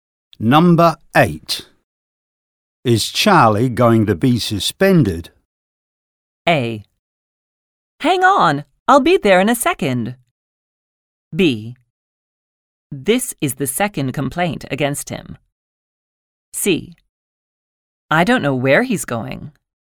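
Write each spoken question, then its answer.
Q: Is Charlie going to be suspended?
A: B: This is the second complaint against him.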